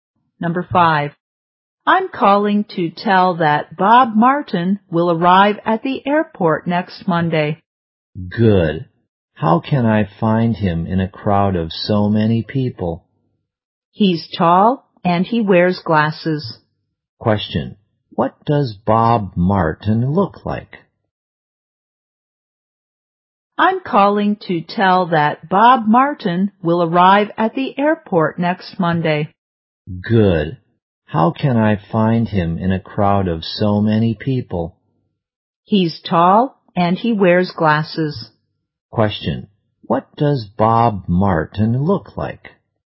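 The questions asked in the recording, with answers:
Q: Question, what does Bob Martin look like?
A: He's tall and wears glasses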